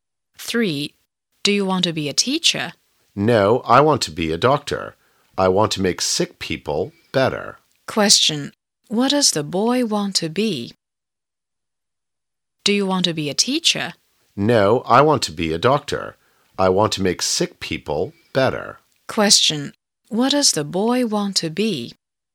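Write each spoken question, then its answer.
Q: What does the boy want to be?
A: A doctor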